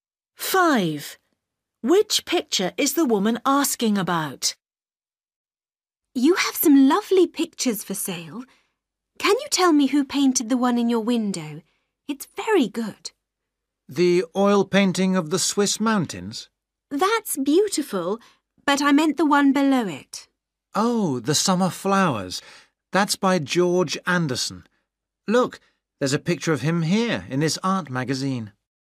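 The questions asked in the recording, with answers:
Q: Which picture is the woman asking about?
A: the summer flowers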